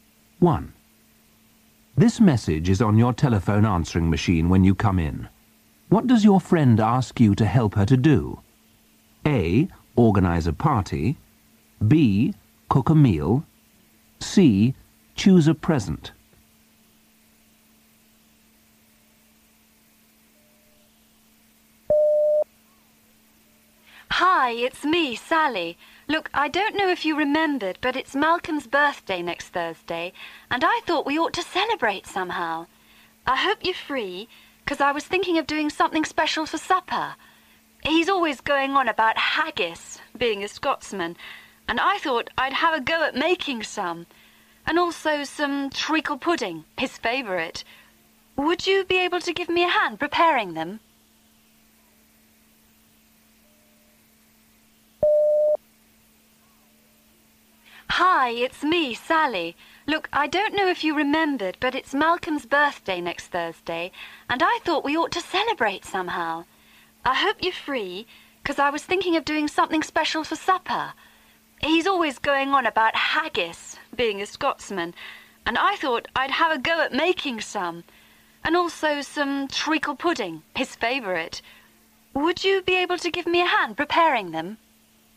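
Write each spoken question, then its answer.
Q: What does your friend ask you to help her to do?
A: B: Cook a meal.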